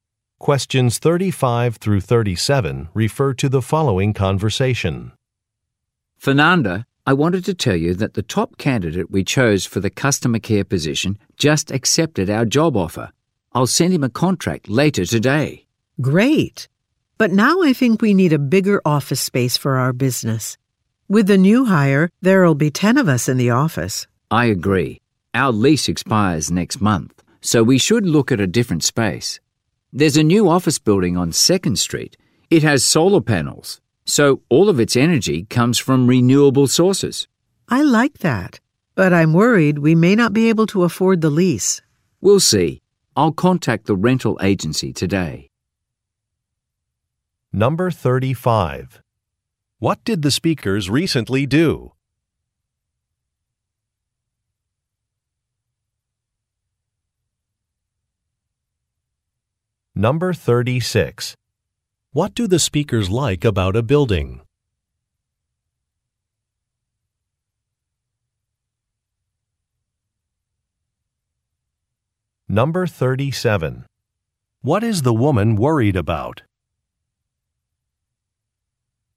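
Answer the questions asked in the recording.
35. Hired a new employee for customer care
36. It uses renewable energy from solar panels
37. They may not be able to afford the lease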